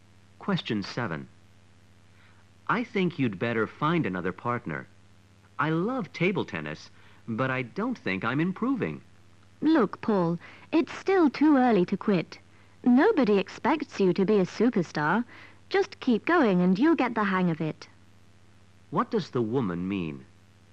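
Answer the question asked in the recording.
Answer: Paul shouldn't quit table tennis; he should keep practicing.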